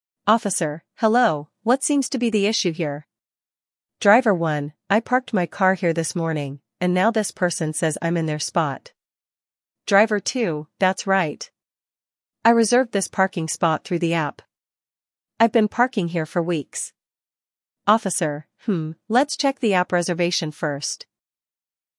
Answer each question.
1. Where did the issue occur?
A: Parking lot

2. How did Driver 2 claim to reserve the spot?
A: Through an app

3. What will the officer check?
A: The app reservation

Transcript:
Officer: Hello, what seems to be the issue here?
Driver 1: I parked my car here this morning, and now this person says I'm in their spot.
Driver 2: That's right! I reserved this parking spot through the app. I've been parking here for weeks.
Officer: Hmm, let's check the app reservation first.